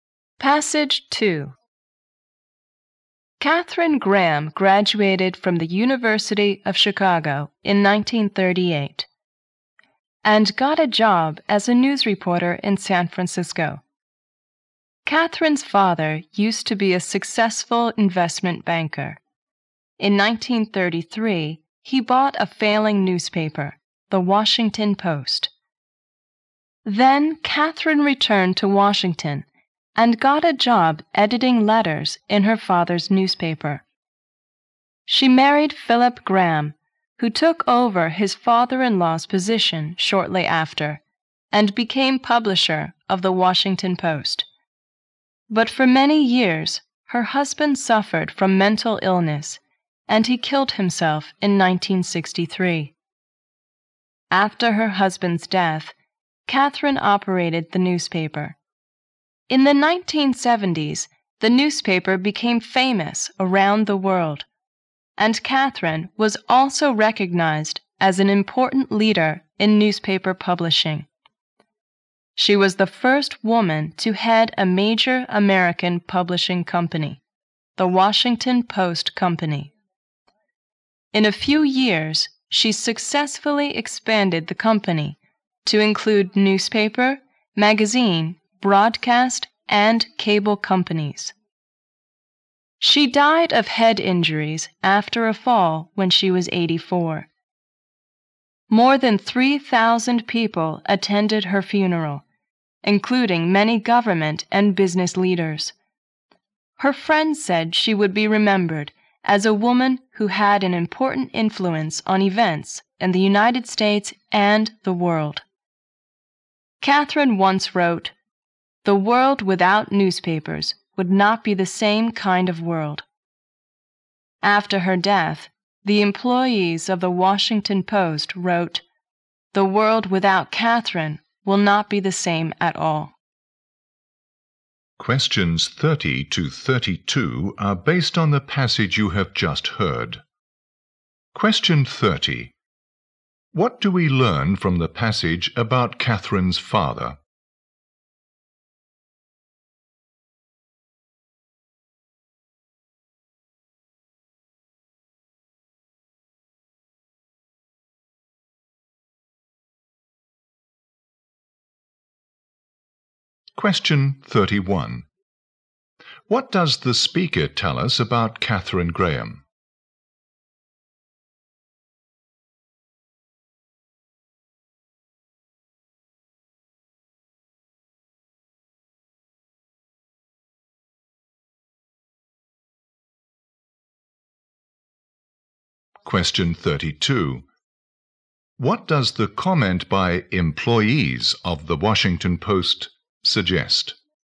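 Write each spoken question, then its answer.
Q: What do we learn from the passage about Catherine's father?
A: He was a successful investment banker who bought The Washington Post in 1933.

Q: What does the speaker tell us about Catherine Graham?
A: She was the first woman to head a major American publishing company.

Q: What does the comment by employees of the Washington Post suggest?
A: Catherine had a great influence and will be greatly missed.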